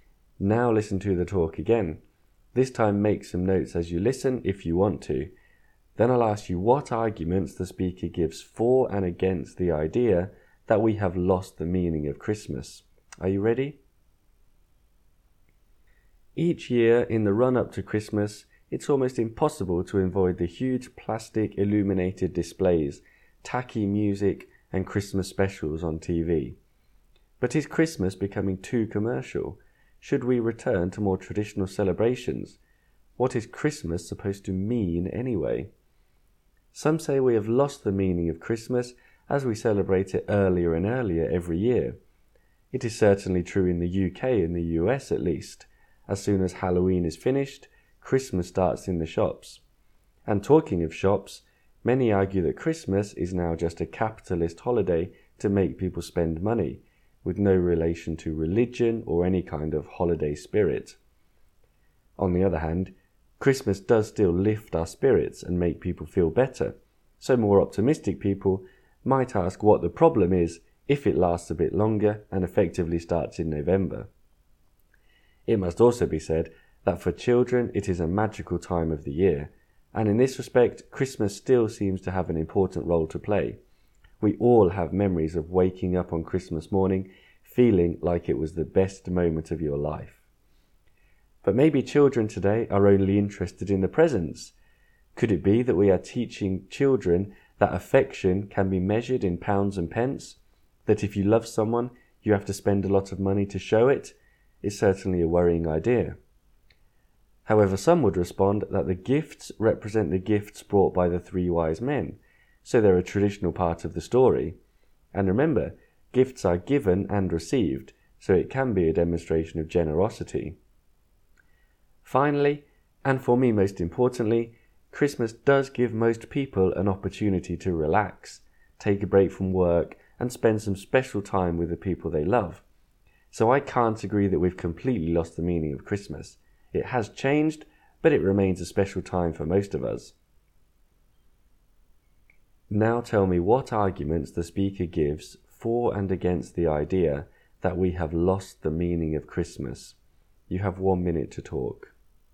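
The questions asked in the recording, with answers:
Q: Now tell me what arguments the speaker gives for and against the idea that we have lost the meaning of Christmas.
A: For: it is celebrated earlier every year, it is commercial and about spending money, and children care only about presents. Against: it lifts people's spirits, it is magical for children, gifts are traditional and show generosity, and it gives people time to relax with the people they love.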